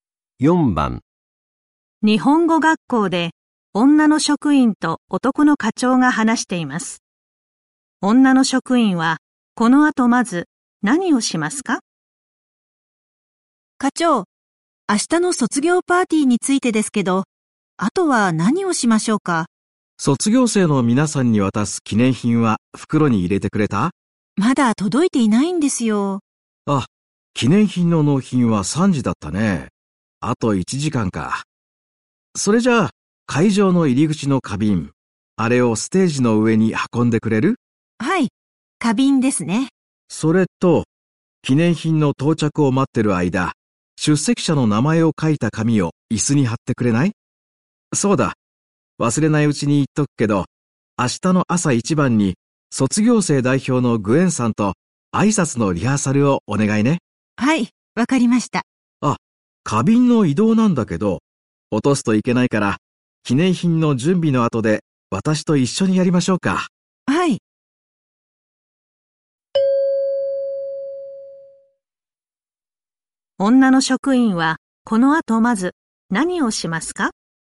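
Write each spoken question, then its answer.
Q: 女の職員はこの後まず何をしますか?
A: 出席者の名前を書いた紙を椅子に貼る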